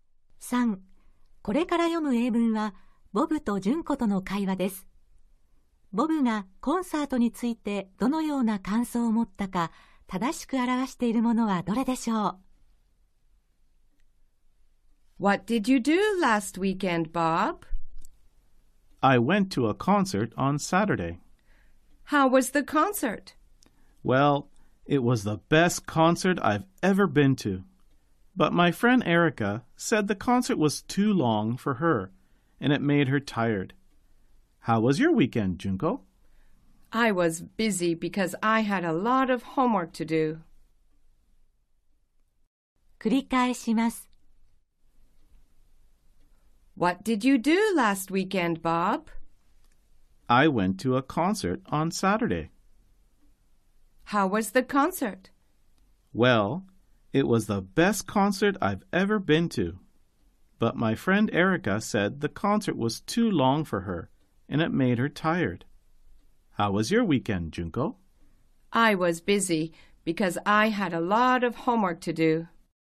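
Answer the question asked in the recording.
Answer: 今まで行った中で最高のコンサートだった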